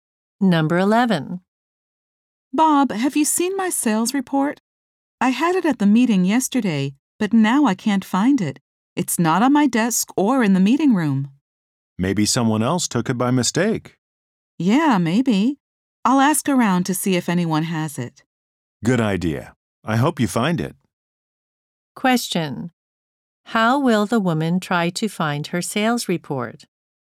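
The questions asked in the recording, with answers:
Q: How will the woman try to find her sales report?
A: She will ask other people whether they have it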